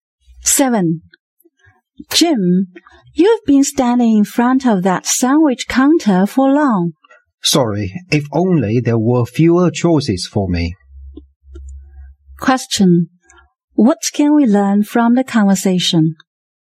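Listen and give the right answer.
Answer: Jim can't decide which sandwich to choose.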